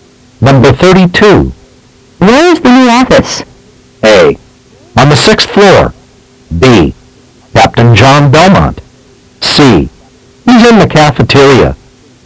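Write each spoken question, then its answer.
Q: Where is the new office?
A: A: On the 6th floor.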